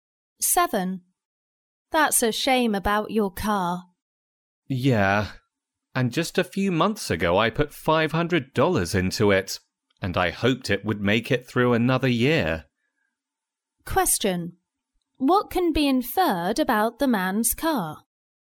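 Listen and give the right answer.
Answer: It has broken down again despite recent expensive repairs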